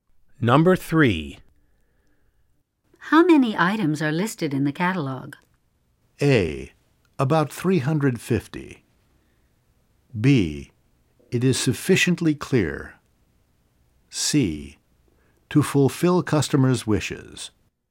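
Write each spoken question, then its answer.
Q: How many items are listed in the catalog?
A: A: About 350.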